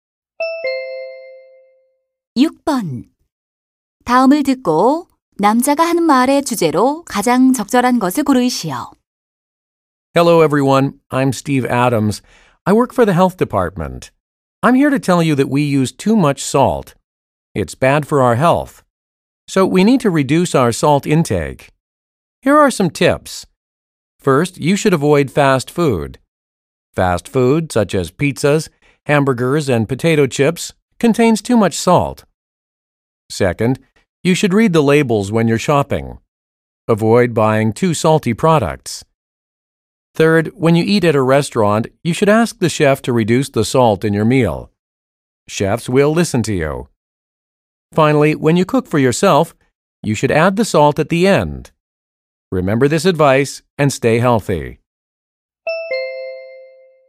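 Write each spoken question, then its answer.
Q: 다음을 듣고 남자가 하는 말의 주제로 가장 적절한 것을 고르시오.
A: 소금 섭취를 줄이는 방법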